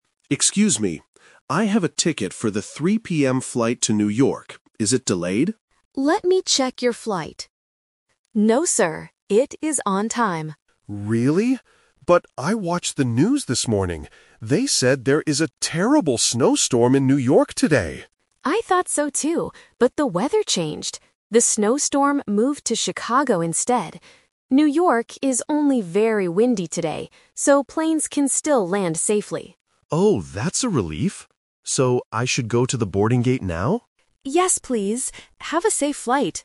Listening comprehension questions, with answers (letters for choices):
Listen to the conversation and choose the best answer (A, B, or C).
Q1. What did the passenger hear on the news this morning?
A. There is a snowstorm in Chicago.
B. There is a snowstorm in New York.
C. There is a thunderstorm in New York.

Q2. What is the actual weather in New York today?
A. It is only very windy.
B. It is snowing heavily.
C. It is sunny and clear.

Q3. What is the status of the passenger's flight?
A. It is delayed.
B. It is canceled.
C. It is on time.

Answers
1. B
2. A
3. C

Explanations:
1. The passenger says, "They said there is a terrible snowstorm in New York today!" Option (A) is the trap because Chicago is where the storm is actually happening right now, not what the passenger heard on the morning news. Option (C) is never mentioned.
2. The agent corrects the passenger's information by saying, "New York is only very windy today...". Option (B) is the trap because it was the old weather forecast. Option (C) is a plausible weather condition but is not mentioned in the audio.
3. At the beginning, the agent checks the computer and says, "No, sir. It is on time." Option (A) is the trap because the passenger asks, "Is it delayed?" due to his worry about the weather. Option (B) is not mentioned.

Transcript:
Passenger: Excuse me. I have a ticket for the 3:00 PM flight to New York. Is it delayed?
Agent: Let me check your flight... No, sir. It is on time.
Passenger: Really? But I watched the news this morning. They said there is a terrible snowstorm in New York today!
Agent: I thought so too, but the weather changed. The snowstorm moved to Chicago instead. New York is only very windy today, so planes can still land safely.
Passenger: Oh, that's a relief! So I should go to the boarding gate now?